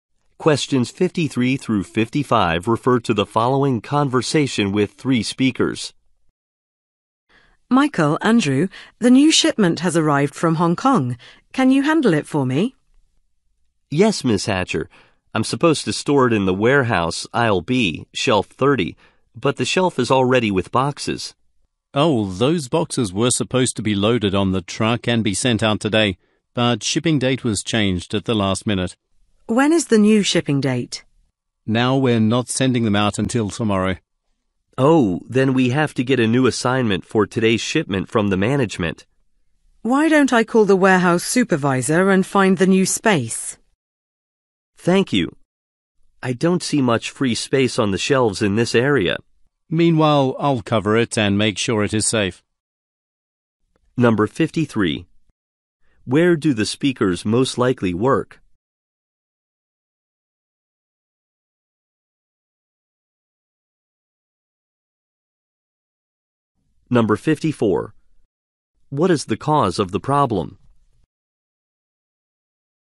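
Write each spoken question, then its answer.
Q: Where do the speakers most likely work?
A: At a warehouse

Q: What is the cause of the problem?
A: A shipping date was changed at the last minute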